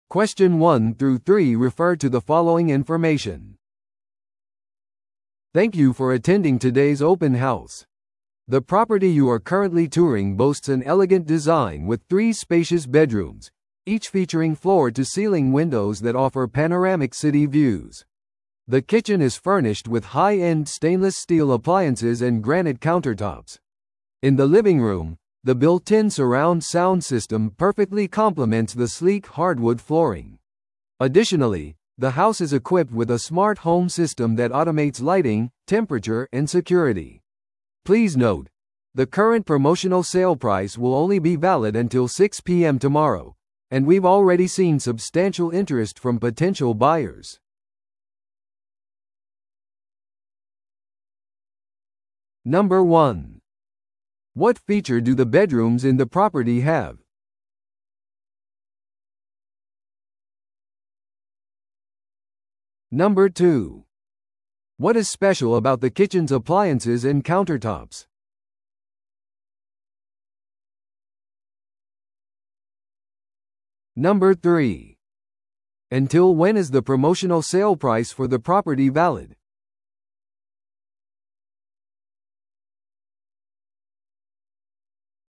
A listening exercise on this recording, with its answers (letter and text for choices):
Listen to the audio below and answer the questions.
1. What feature do the bedrooms in the property have?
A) 専用バスルーム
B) 床から天井までの窓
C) プライベートバルコニー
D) ウォークインクローゼット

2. What is special about the kitchen's appliances and countertops?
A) カスタムメイドです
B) エコフレンドリーです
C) ステンレス製とグラニートです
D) 取り外し可能です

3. Until when is the promotional sale price for the property valid?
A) 本日の6pmまで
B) 明日の9amまで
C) 明日の12pmまで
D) 明日の6pmまで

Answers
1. B) 床から天井までの窓
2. C) ステンレス製とグラニートです
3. D) 明日の6pmまで

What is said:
Thank you for attending today's open house. The property you are currently touring boasts an elegant design with three spacious bedrooms, each featuring floor-to-ceiling windows that offer panoramic city views. The kitchen is furnished with high-end stainless steel appliances and granite countertops. In the living room, the built-in surround sound system perfectly complements the sleek hardwood flooring. Additionally, the house is equipped with a smart home system that automates lighting, temperature, and security. Please note, the current promotional sale price will only be valid until 6pm tomorrow, and we've already seen substantial interest from potential buyers.